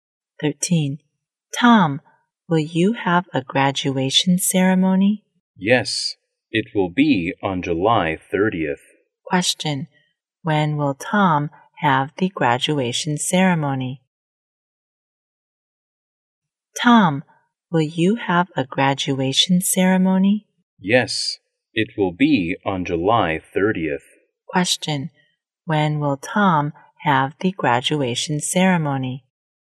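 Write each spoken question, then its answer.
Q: when will Tom have the graduation ceremony?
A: On July 30th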